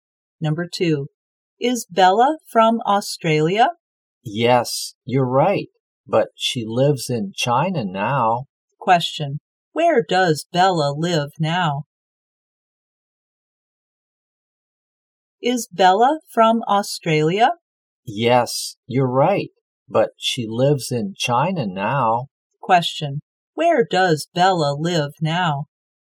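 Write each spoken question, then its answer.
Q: where does Bella live now?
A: In China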